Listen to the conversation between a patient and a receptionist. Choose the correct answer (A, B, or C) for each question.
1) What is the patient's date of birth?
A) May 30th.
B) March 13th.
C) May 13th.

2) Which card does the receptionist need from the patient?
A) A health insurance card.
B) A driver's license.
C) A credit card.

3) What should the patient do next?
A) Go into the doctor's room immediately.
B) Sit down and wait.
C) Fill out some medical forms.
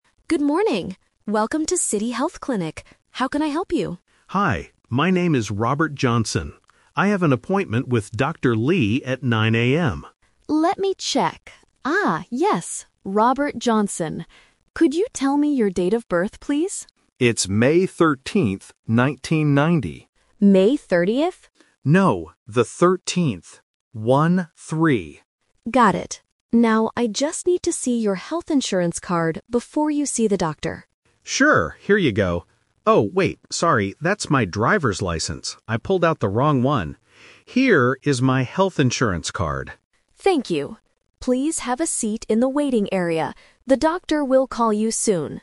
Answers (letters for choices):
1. C
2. A
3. B

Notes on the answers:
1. The patient explicitly says, "No, the 13th. One-three." Trap A is wrong (Number Trap): The receptionist mishears and asks "May 30th?", but the patient corrects her. Trap B is wrong: March is a different month, not mentioned in the audio.
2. The receptionist clearly asks, "I just need to see your health insurance card." Trap B is wrong (The Twist): The patient gives his driver's license first by mistake ("Oh, wait, sorry. That's my driver's license"), but it's not what the receptionist asked for. Trap C is wrong: A credit card is a plausible item in a wallet, but it is never mentioned.
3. The receptionist tells him, "Please have a seat in the waiting area." ("Have a seat" means to sit down). Trap A is wrong: The receptionist says "The doctor will call you soon," meaning he has to wait, not go in immediately. Trap C is wrong: Filling out forms is a very common activity at a clinic, but it is not mentioned in this conversation.

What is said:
Receptionist: Good morning. Welcome to City Health Clinic. How can I help you?
Patient: Hi. My name is Robert Johnson. I have an appointment with Dr. Lee at 9 AM.
Receptionist: Let me check... Ah, yes, Robert Johnson. Could you tell me your date of birth, please?
Patient: It's May 13th, 1990.
Receptionist: May 30th?
Patient: No, the 13th. One-three.
Receptionist: Got it. Now, I just need to see your health insurance card before you see the doctor.
Patient: Sure. Here you go. Oh, wait, sorry. That's my driver's license. I pulled out the wrong one. Here is my health insurance card.
Receptionist: Thank you. Please have a seat in the waiting area. The doctor will call you soon.